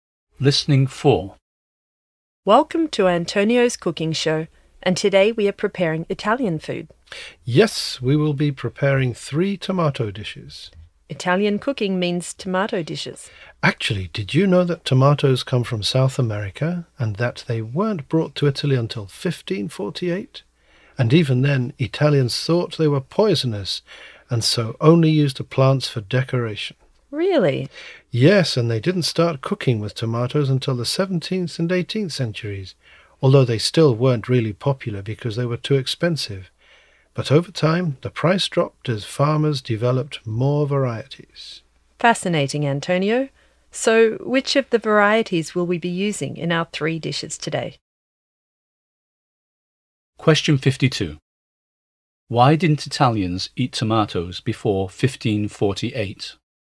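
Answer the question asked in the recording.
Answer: Tomatoes hadn't been brought to Italy yet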